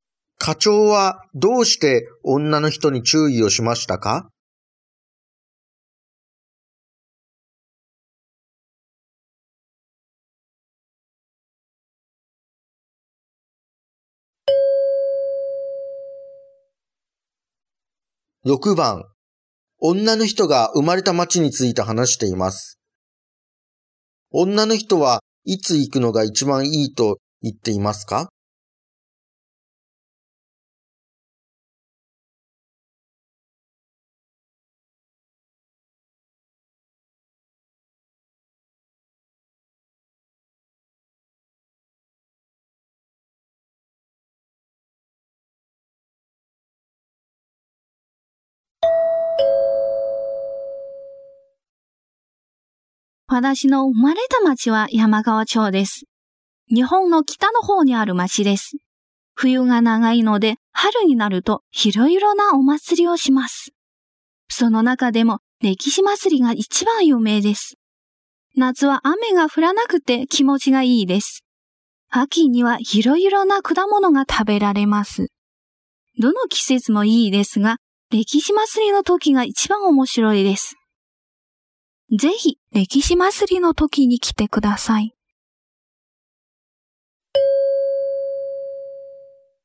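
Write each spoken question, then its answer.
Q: 女の人はいつ行くのが一番いいと言っていますか?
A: 歴史祭りの時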